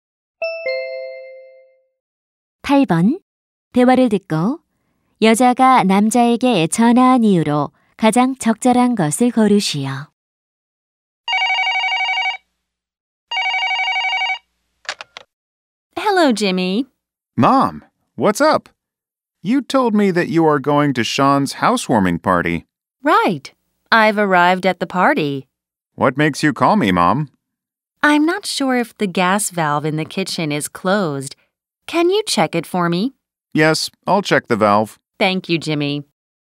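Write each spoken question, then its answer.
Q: 대화를 듣고 여자가 남자에게 전화한 이유로 가장 적절한 것을 고르시오.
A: 부엌 가스 밸브 확인을 부탁하려고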